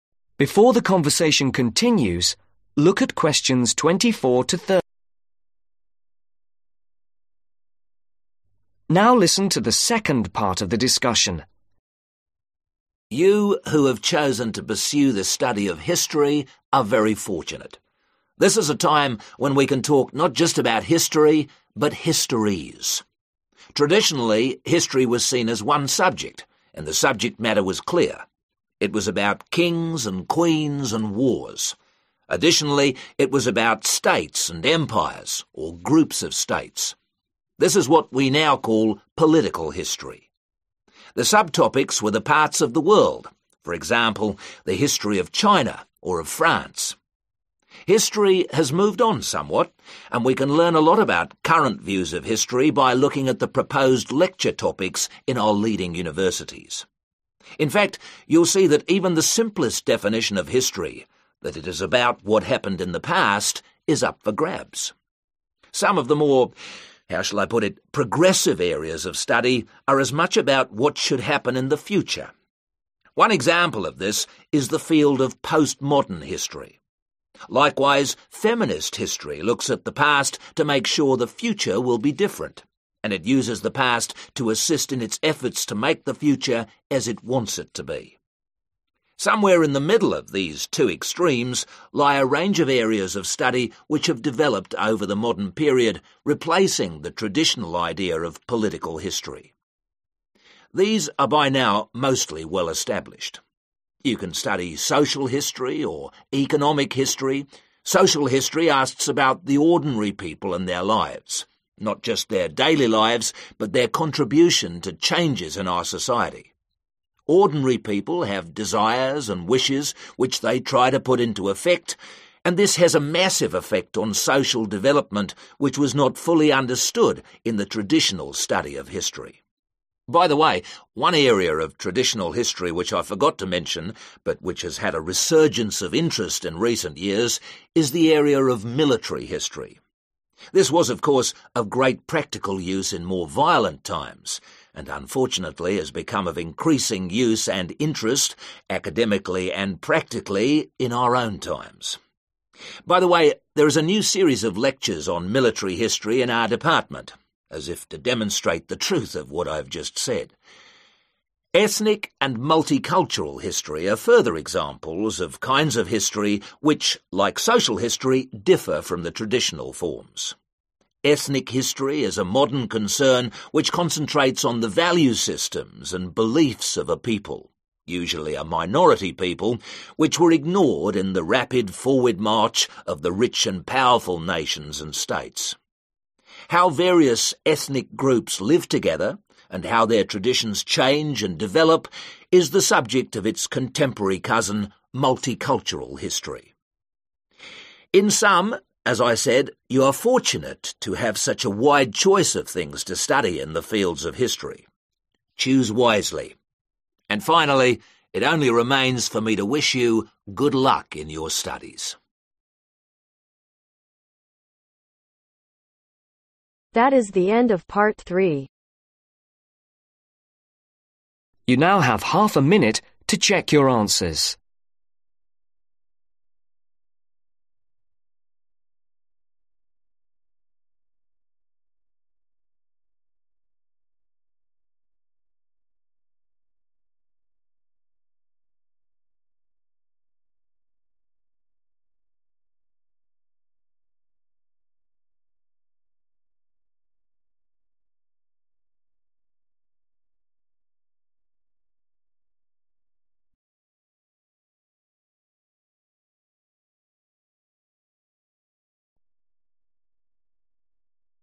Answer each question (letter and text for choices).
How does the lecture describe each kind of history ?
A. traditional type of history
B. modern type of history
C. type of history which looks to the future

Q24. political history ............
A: A. traditional type of history

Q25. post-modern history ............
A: C. type of history which looks to the future

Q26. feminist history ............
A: C. type of history which looks to the future

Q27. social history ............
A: B. modern type of history

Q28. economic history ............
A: B. modern type of history

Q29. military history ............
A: A. traditional type of history

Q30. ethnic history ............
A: B. modern type of history